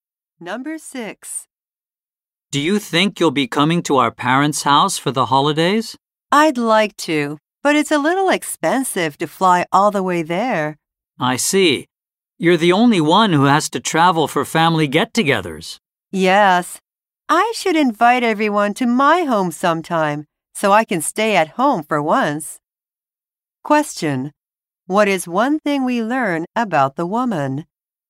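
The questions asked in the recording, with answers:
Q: What is one thing we learn about the woman?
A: She has to travel far for family get-togethers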